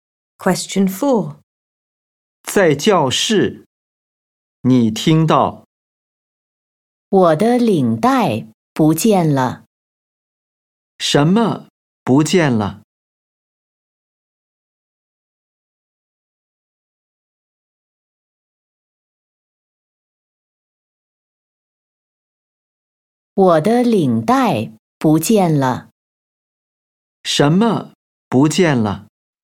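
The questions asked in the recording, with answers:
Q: 什么不见了?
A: 领带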